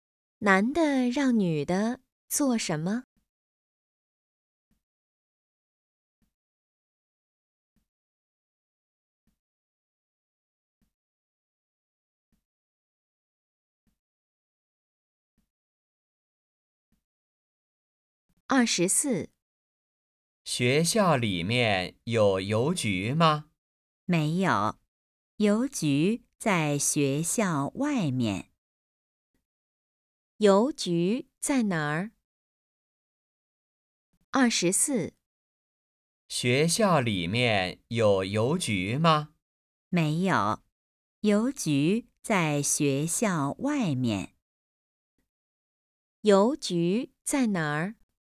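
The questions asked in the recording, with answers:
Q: 邮局在哪儿?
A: 学校外面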